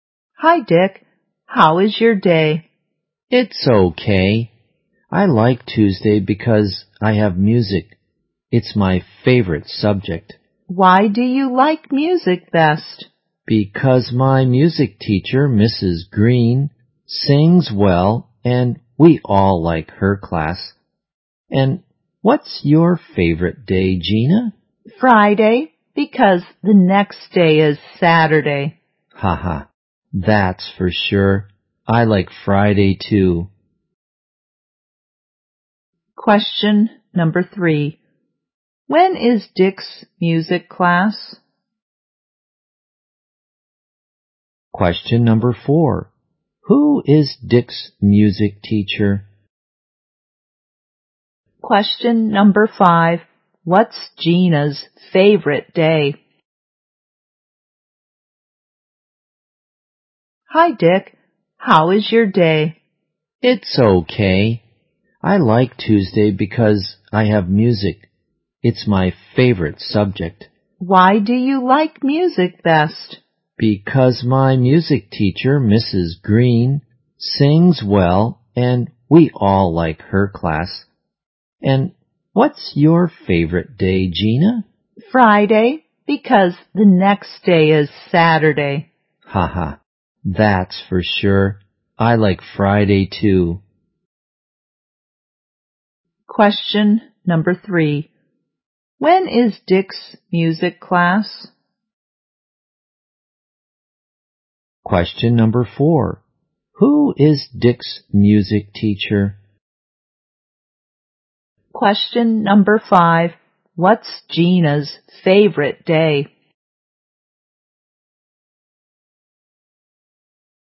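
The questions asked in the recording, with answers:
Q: When is Dick's music class?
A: On Tuesday

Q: Who is Dick's music teacher?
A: Mrs. Green

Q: What's Gina's favorite day?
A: Friday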